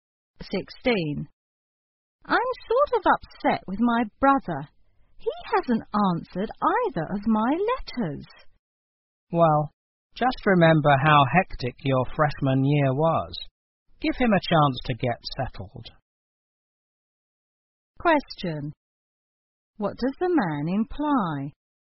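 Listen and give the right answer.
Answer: The brother is probably busy adjusting to his first year at college, so the woman should be patient.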